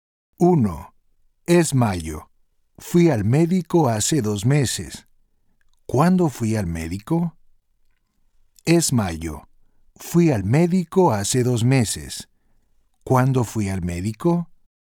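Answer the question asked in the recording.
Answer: en marzo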